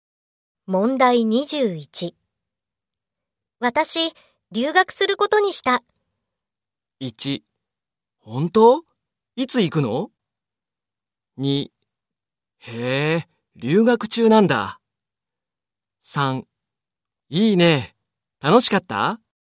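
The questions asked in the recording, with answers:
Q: 私、留学することにした。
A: 1: 本当?いつ行くの?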